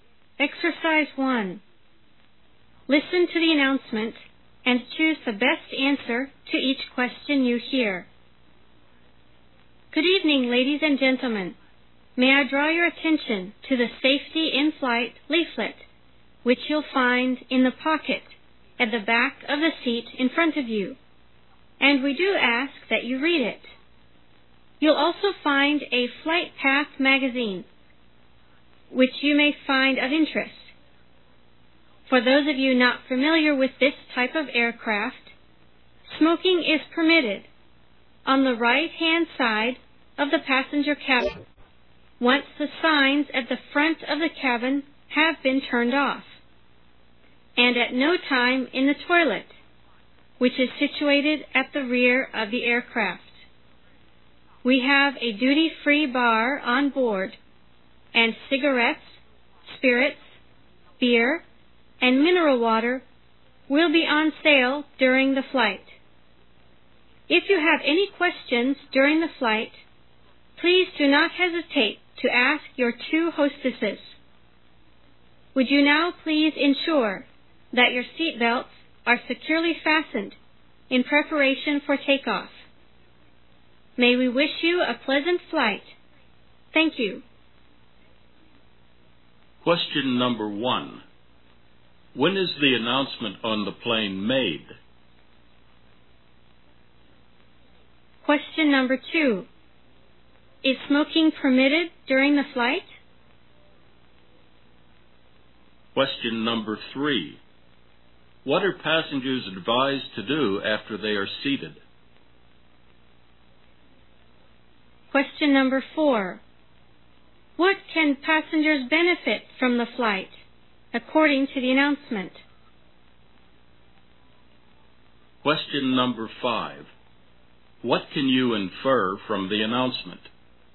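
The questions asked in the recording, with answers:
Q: When is the announcement on the plane made?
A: Before takeoff

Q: Is smoking permitted during the flight?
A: Yes, on the right-hand side of the cabin once the signs are off, but never in the toilet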